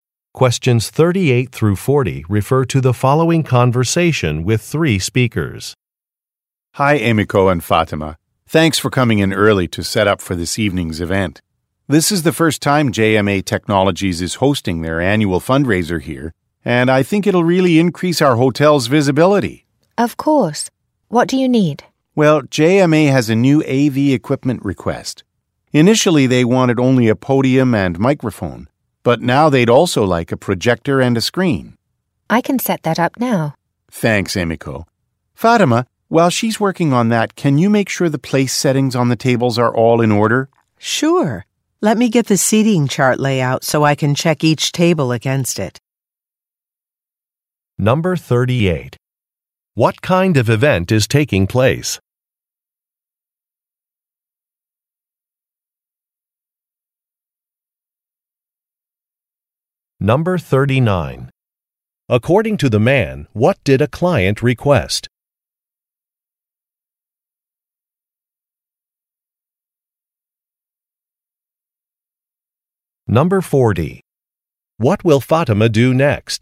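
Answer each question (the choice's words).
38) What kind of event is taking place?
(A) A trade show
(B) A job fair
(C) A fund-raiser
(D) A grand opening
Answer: A fund-raiser

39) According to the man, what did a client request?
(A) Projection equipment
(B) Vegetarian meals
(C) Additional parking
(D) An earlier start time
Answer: Projection equipment

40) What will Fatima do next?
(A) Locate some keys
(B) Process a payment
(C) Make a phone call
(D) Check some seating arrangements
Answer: Check some seating arrangements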